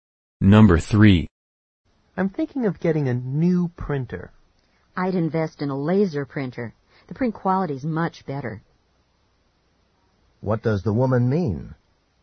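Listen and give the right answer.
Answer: He should buy a laser printer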